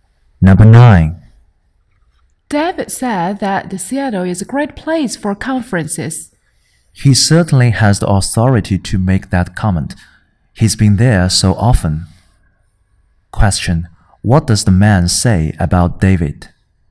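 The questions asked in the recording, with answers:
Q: What does the man say about David?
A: David knows Seattle well because he has been there often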